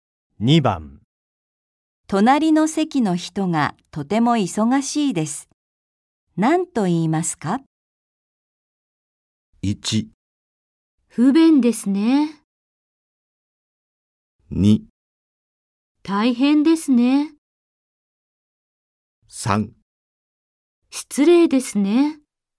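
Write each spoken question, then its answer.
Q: 隣の席の人がとても忙しいです。何と言いますか?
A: 2: 大変ですね。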